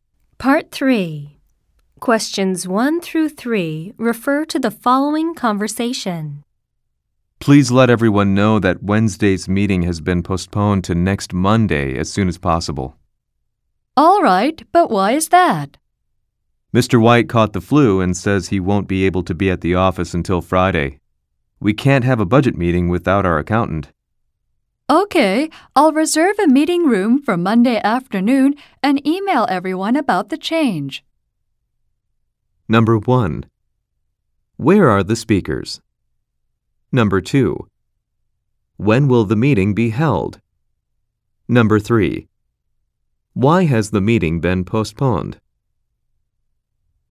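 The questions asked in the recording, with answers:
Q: When will the meeting be held?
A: Next Monday afternoon

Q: Why has the meeting been postponed?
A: The accountant, Mr. White, has the flu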